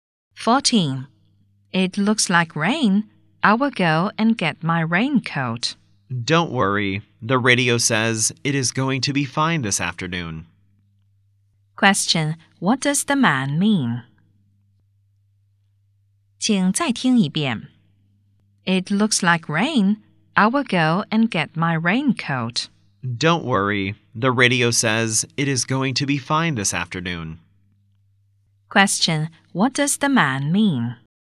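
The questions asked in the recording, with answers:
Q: What does the man mean?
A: There's no need to get a raincoat; it will be fine this afternoon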